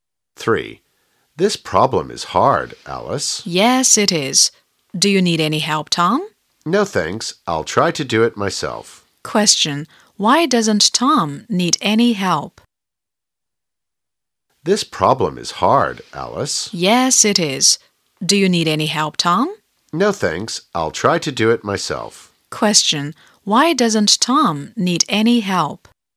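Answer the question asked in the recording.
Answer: He'll try to do it himself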